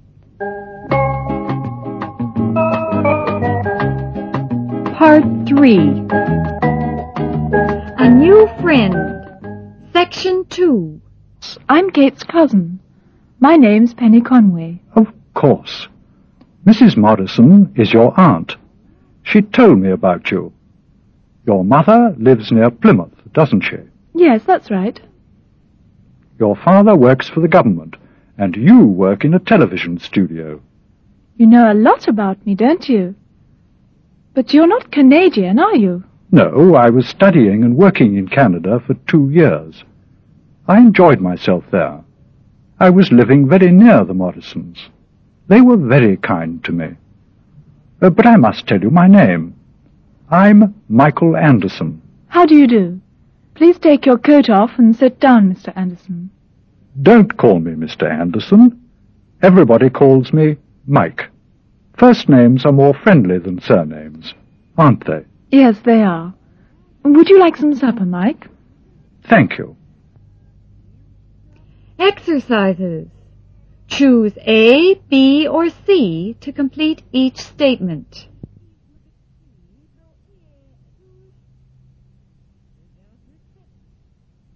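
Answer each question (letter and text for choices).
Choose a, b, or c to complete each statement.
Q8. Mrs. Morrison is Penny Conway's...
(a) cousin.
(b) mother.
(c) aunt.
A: (c) aunt.

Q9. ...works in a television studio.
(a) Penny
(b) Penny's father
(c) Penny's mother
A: (a) Penny

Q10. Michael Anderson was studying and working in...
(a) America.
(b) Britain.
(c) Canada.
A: (c) Canada.

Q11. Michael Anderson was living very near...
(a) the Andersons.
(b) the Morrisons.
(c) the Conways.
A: (b) the Morrisons.

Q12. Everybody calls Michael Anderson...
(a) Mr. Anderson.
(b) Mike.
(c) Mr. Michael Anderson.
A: (b) Mike.

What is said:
penny: Please come in.
Michael: But you're busy, aren't you?
Penny: I was getting my supper but I've finished now.
Michael: I can leave the parcel with you, can't I?
Penny: Oh! Yes.
A New Friend (II) (1'5′′)
Penny: I'm Kate's cousin. My name's Penny Conway.
Michael: Of course! 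Mrs. Morrison is your aunt. She told me about you. Your mother lives near Plymouth, doesn't she?
Penny: Yes, that's right.
Michael: Your father works for the government, and you work in a television studio.
Penny: You know a lot about me, don't you? But you're not Canadian, are you?
Michael: No. I was studying and working in Canada for two years. I enjoyed myself there. I was living very near the Morrisons They were very kind to me. But I must tell you my name. I'm Michael Anderson.
Penny: How do you do? Please take your coat off and sit down, Mr. Anderson.
Michael: Don't call me Mr. Everybody calls me Mike. First names are more friendly than surnames, aren't they?
Penny: Yes, they are. Would you like some supper, Mike?
Michael: Thank you.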